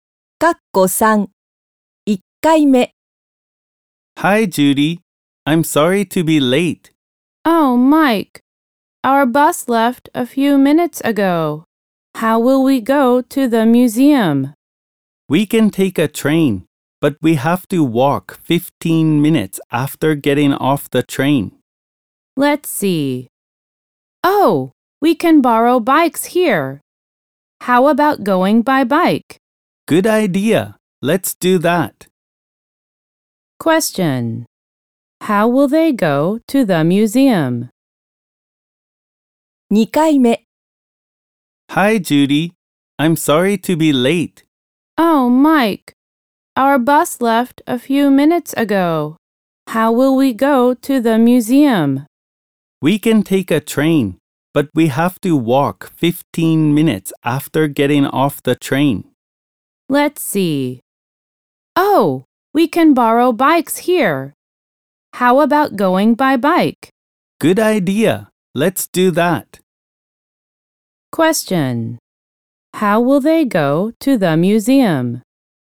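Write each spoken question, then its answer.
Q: How will they go to the museum?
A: By bike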